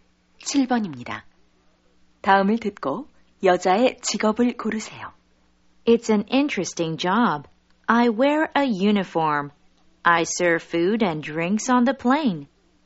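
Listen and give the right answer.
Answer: 승무원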